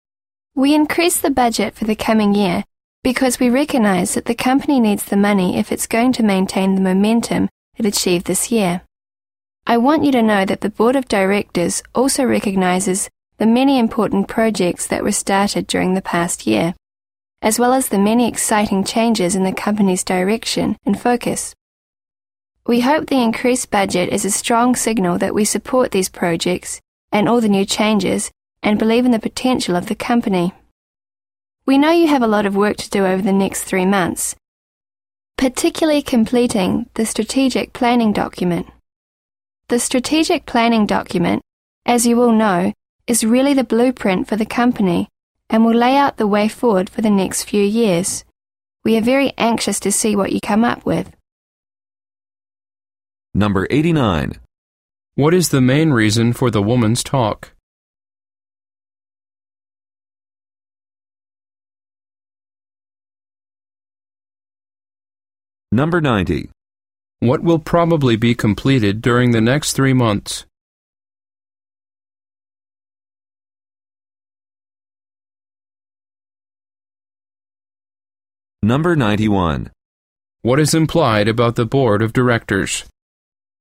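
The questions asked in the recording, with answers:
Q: What will probably be completed during the next 3 months?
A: The strategic planning document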